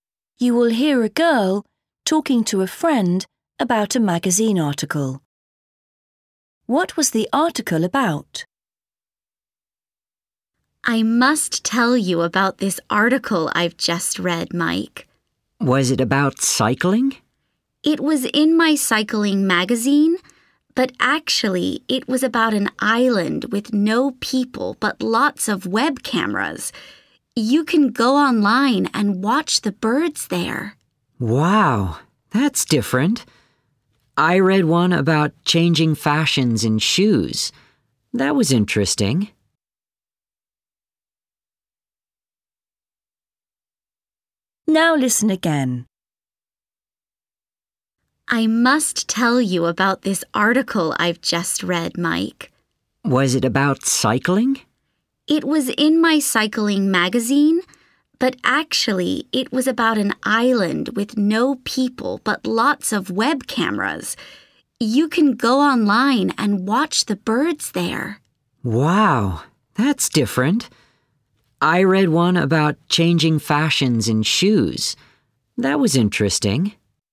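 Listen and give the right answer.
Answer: an island with web cameras where you can watch birds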